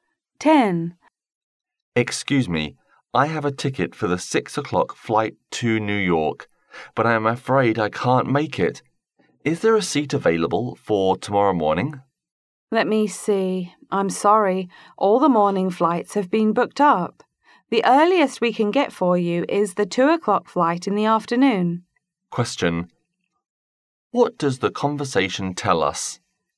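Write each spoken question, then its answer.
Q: What does the conversation tell us?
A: The earliest available flight is at 2 p.m. tomorrow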